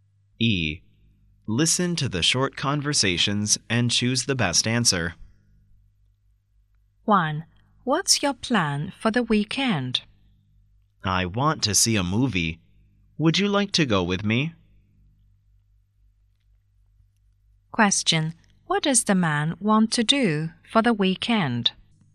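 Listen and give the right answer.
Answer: See a movie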